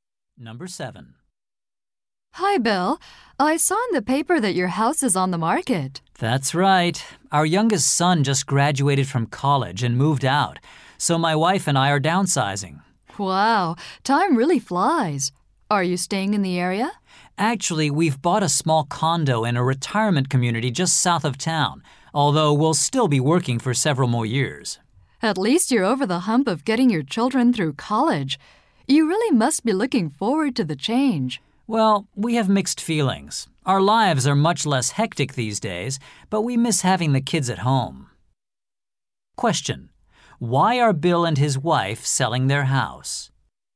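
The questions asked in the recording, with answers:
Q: Why are Bill and his wife selling their house?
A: Their children have moved out, so they are moving somewhere smaller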